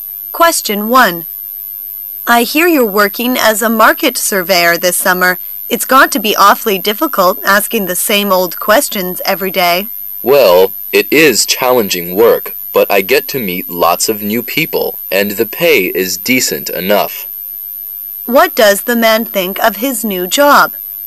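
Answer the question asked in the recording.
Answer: It's challenging, but he enjoys meeting new people and the pay is decent.

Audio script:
[解析] W: I hear you're working as a market surveyor this summer. It's got to be awfully difficult asking the same old questions every day. M: Well, it is challenging work, but I get to meet lots of new people and the pay is decent enough. Q: What does the man think of his new job?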